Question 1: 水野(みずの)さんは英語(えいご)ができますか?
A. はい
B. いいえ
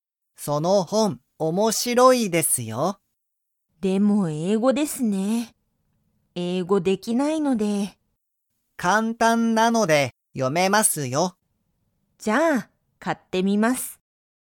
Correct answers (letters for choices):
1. B

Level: Level 1